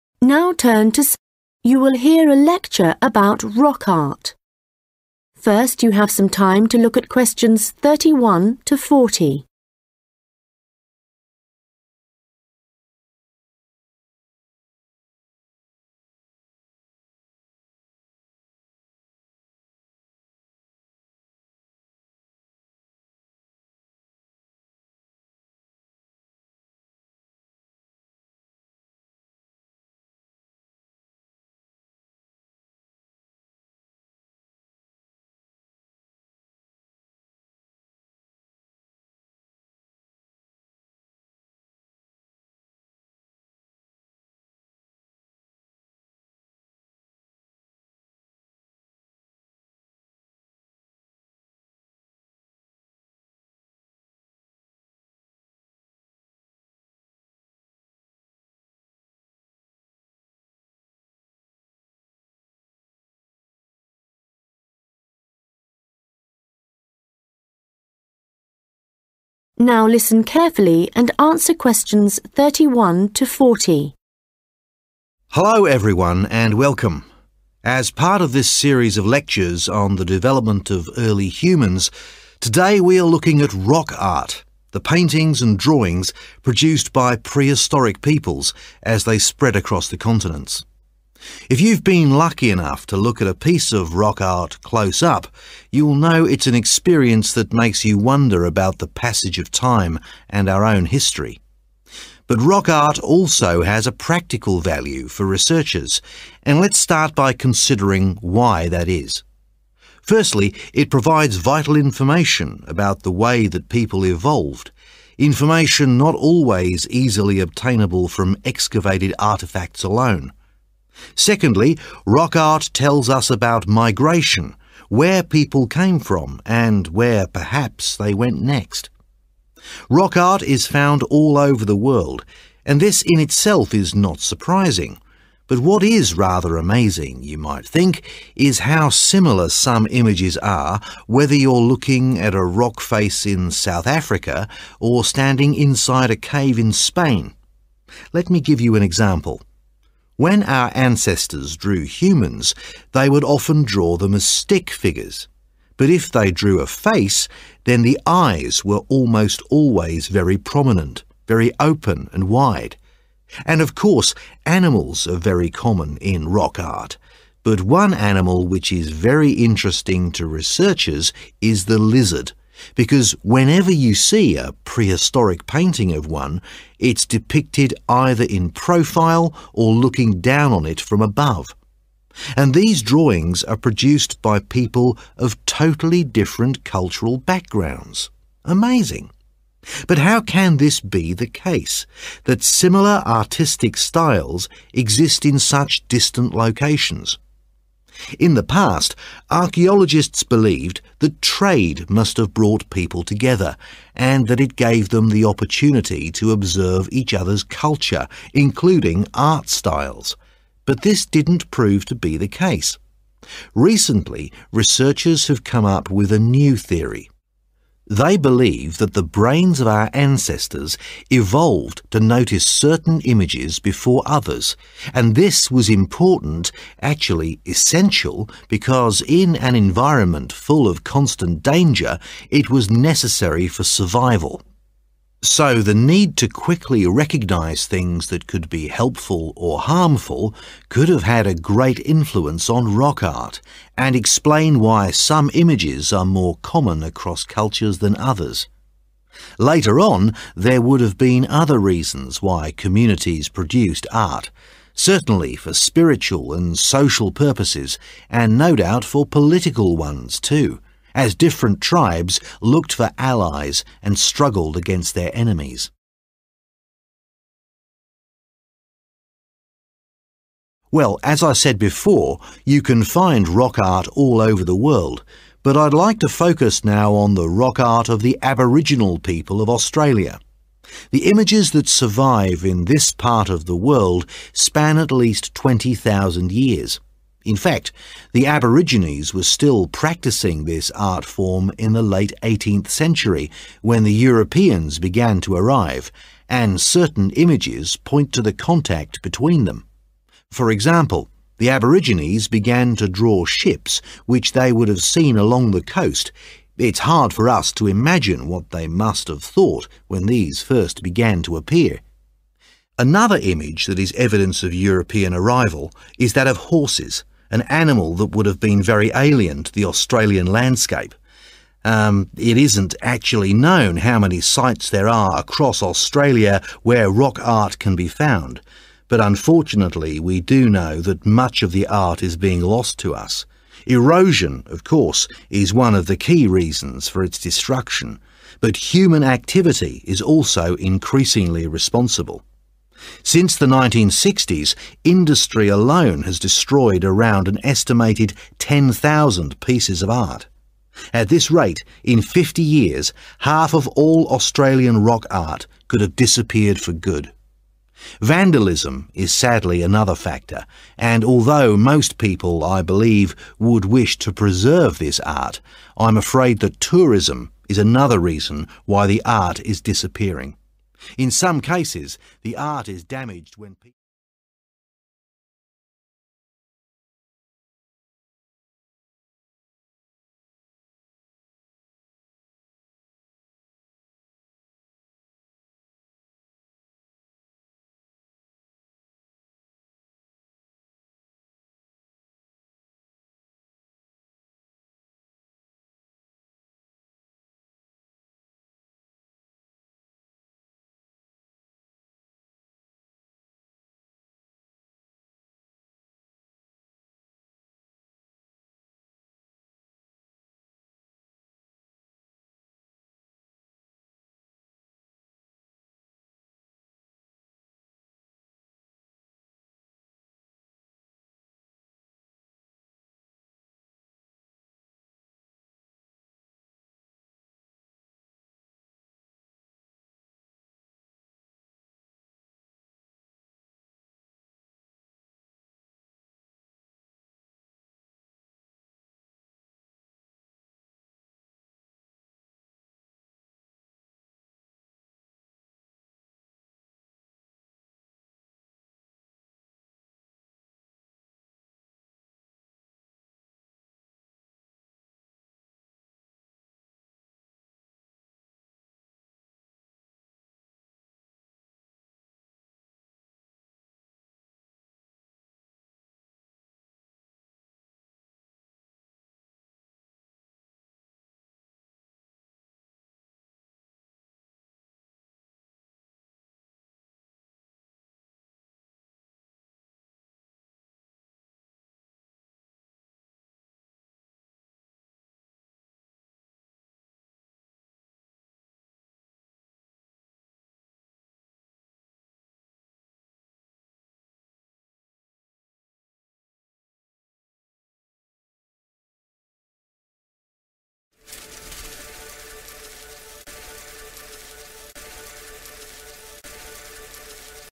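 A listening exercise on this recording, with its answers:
Questions 31-36 Complete the notes below. Write ONE WORD ONLY for each answer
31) • evolution 31•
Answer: migration

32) • humans often had large 32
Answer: eyes

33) • animals were common, but a 33 was always drawn from the side or from above.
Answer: lizard

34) • unlikely that contact through 34 resulted in similar artistic styles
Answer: trade

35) • firstly for reasons of 35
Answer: survival

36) • later for social, spiritual and 36 reasons.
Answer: political

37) What TWO images drawn by Aboriginal people show their contact with Europeans? 37•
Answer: ships

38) • 38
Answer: horses

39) Which human activities does the lecturer say are the main threats to Aboriginal rock art? 39•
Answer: industry

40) • vandalism • 40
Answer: tourism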